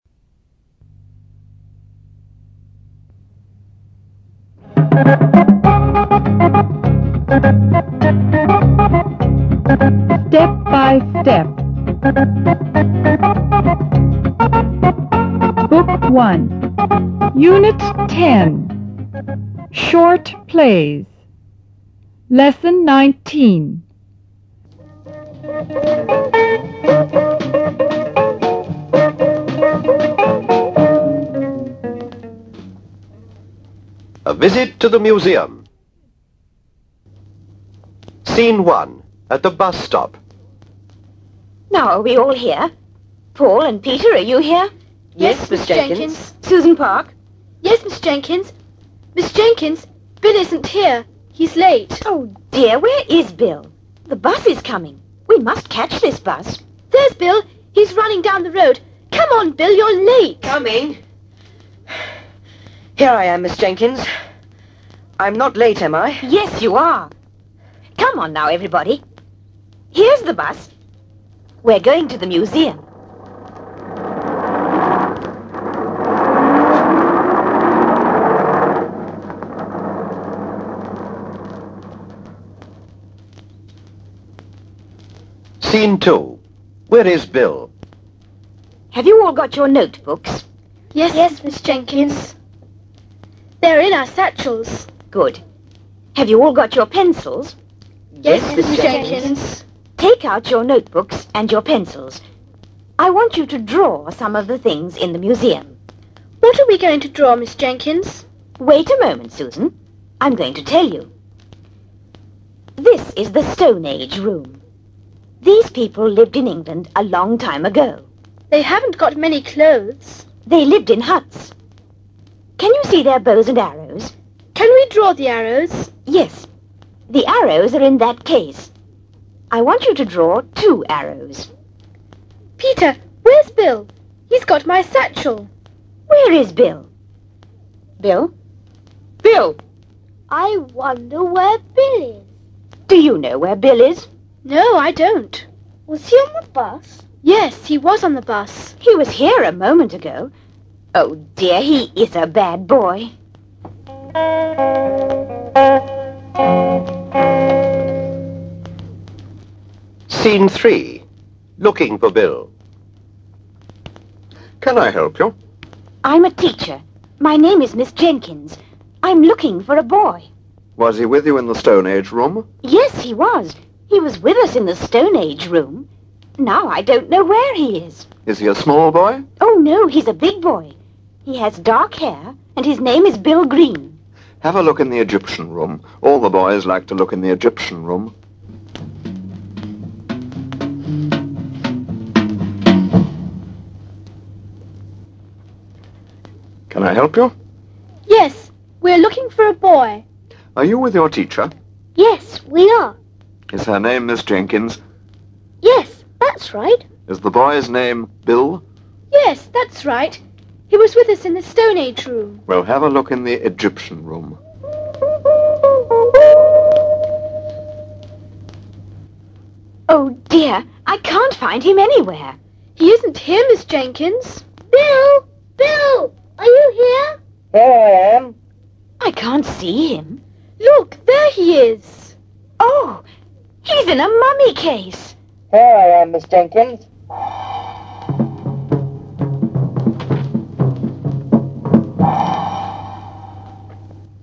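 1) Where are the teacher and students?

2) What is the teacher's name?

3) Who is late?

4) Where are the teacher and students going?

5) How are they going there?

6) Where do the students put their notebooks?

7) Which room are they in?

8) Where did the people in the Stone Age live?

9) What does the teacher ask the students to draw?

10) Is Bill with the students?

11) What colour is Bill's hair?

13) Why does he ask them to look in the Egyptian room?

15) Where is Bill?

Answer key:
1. At the bus stop.
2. Miss Jenkins.
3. Bill.
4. To the museum.
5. By bus.
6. In their satchels.
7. The Stone Age room.
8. In huts.
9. Two arrows.
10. No, he isn't.
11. Dark.
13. Because all the boys like to look in the Egyptian room.
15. In a mummy case.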